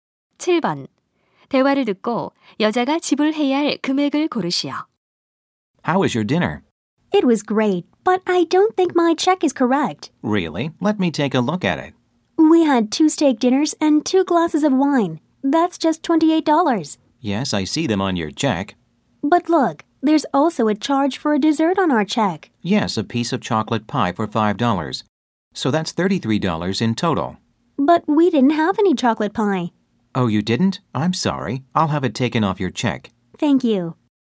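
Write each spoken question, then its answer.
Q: 대화를 듣고 여자가 지불해야 할 금액을 고르시오.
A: 28달러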